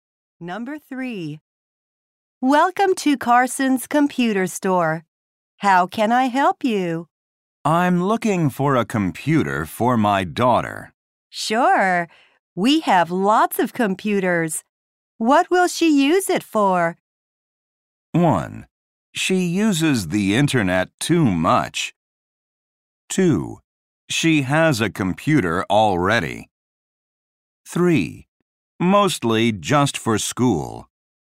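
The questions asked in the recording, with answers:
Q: What will she use it for?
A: 3: Mostly just for school.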